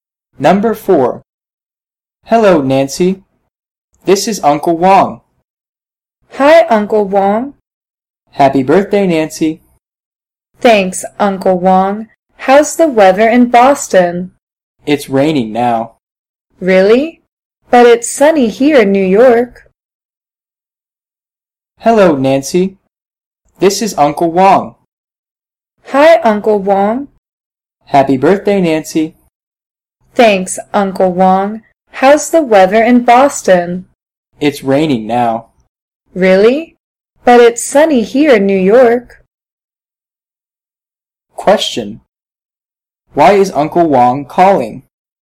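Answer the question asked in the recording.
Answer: To say happy birthday to Nancy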